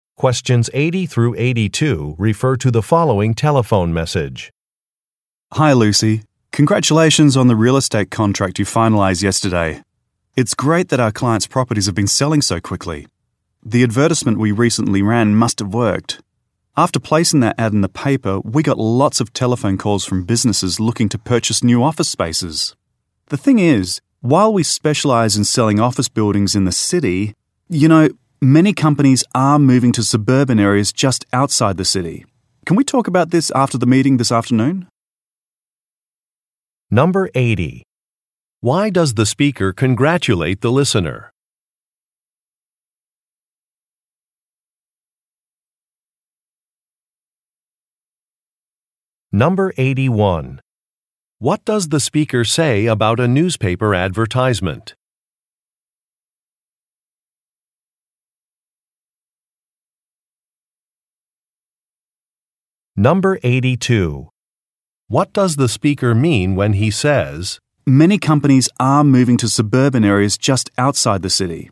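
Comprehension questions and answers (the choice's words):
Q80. Why does the speaker congratulate the listener?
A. She started a business.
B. She won an award.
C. She finalized a contract.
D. She gave a presentation.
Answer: She finalized a contract.

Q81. What does the speaker say about a newspaper advertisement?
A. It will be finished shortly.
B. It has increased business.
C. It needs to be modified.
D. It is well under budget.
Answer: It has increased business.

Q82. What does the speaker mean when he says, "many companies are moving to suburban areas just outside the city"?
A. He will be moving to another city.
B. He is worried about a new policy.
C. Pollution in surrounding areas will probably increase.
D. A different sales strategy should be considered.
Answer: A different sales strategy should be considered.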